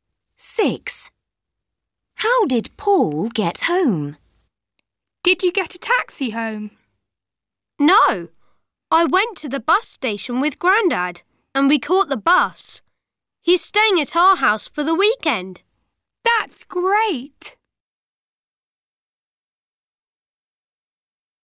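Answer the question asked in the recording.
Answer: By bus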